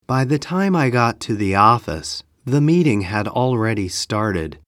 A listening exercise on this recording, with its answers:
英文の音声を聞いて空所のことばを記入しなさい。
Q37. ____________ I got to the office, the meeting _____________ .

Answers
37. By the time, had already started